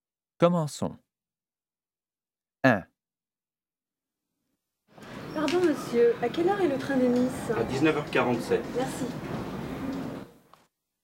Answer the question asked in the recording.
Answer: number 1, 1947